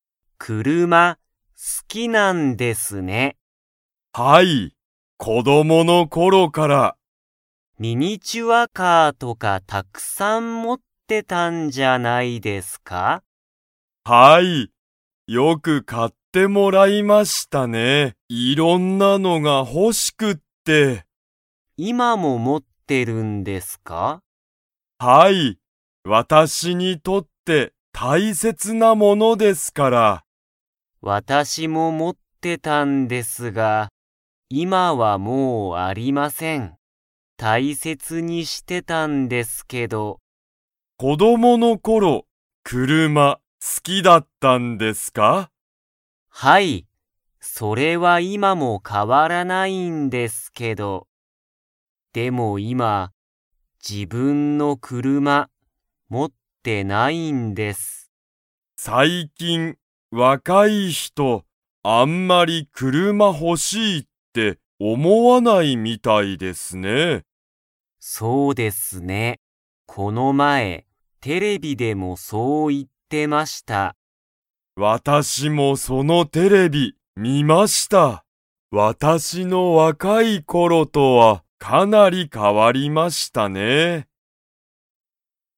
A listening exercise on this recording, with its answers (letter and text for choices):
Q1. オーナーは、今(いま)もミニチュアカーを持(も)っていますか?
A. はい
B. いいえ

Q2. 最近若(さいきんわか)い人(ひと)は、あんまり____をほしいと思(おも)わないみたいだ。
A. テレビ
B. 車(くるま)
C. ミニチュアカー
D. 家族(かぞく)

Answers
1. A. はい
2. B. 車(くるま)

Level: Level 2